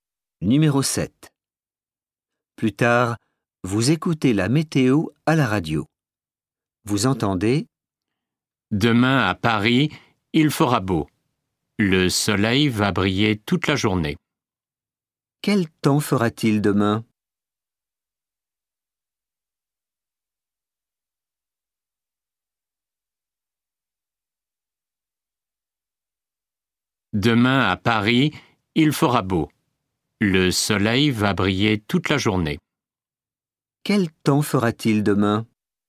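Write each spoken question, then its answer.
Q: Quel temps fera-t-il demain?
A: il fera beau, avec du soleil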